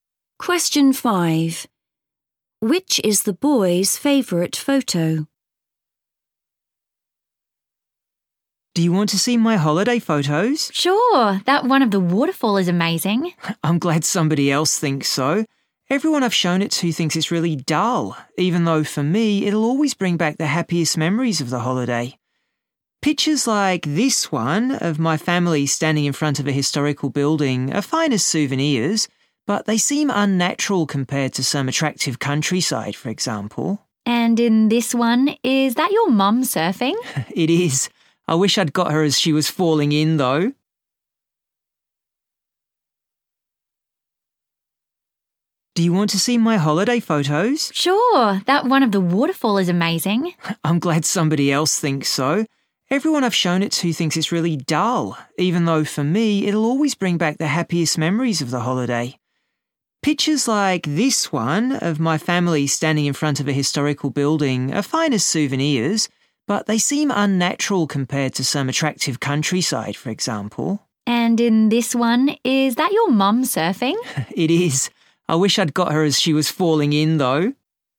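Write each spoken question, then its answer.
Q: Which is the boy's favorite photo?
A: the waterfall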